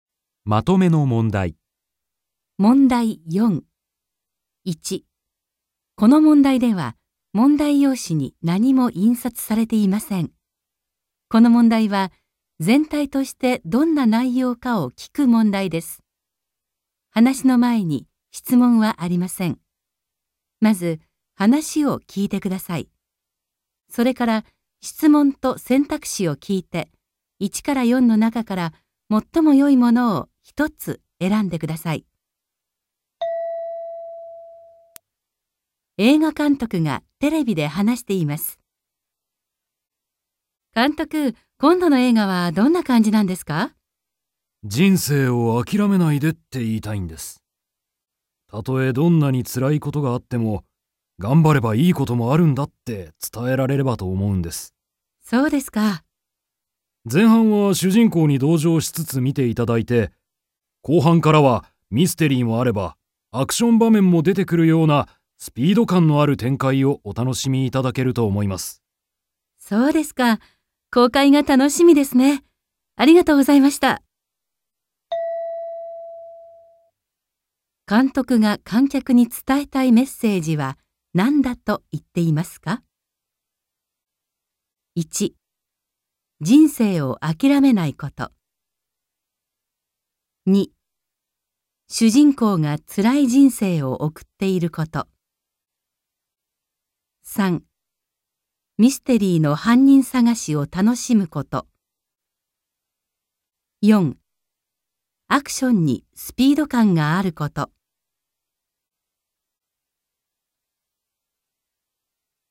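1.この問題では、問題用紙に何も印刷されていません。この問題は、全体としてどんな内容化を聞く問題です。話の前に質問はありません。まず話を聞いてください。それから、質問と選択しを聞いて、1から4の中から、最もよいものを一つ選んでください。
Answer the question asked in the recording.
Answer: 人生をあきらめないこと

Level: N2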